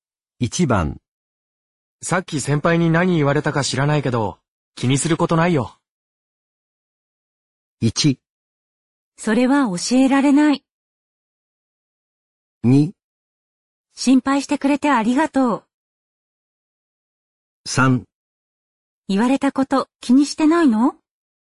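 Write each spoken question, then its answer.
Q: さっき先輩に何言われたか知らないけど、気にすることないよ。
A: 2: 心配してくれてありがとう。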